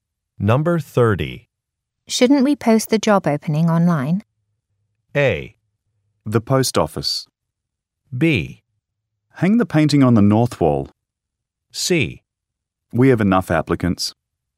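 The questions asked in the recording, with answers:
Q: Shouldn't we post the job opening online?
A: C: We have enough applicants.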